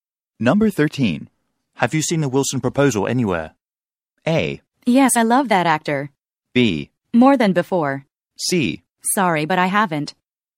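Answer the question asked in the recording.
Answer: C: Sorry, but I haven't.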